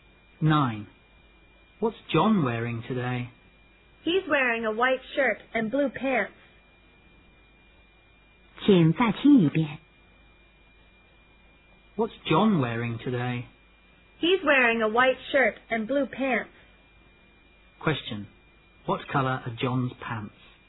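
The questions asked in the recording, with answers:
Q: What color are John's pants?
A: Blue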